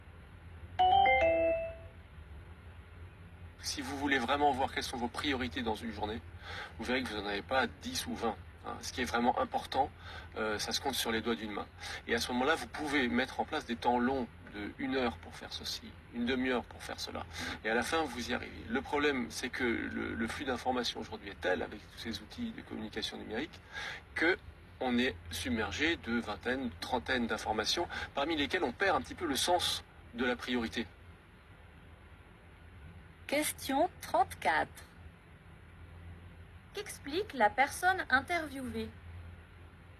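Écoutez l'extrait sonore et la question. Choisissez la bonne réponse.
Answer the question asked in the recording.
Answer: Comment gérer ses priorités face au flux d'informations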